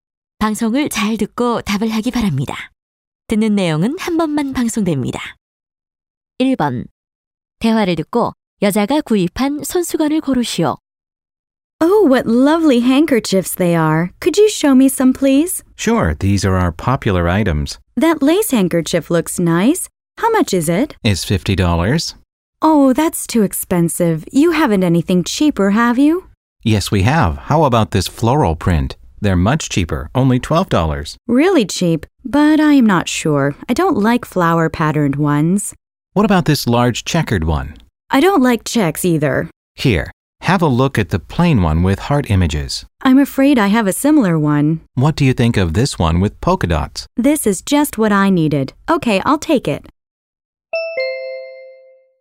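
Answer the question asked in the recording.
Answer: 물방울무늬 손수건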